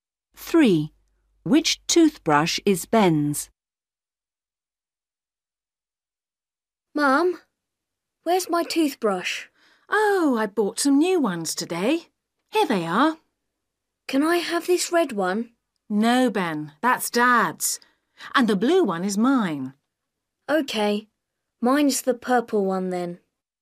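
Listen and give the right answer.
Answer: The purple one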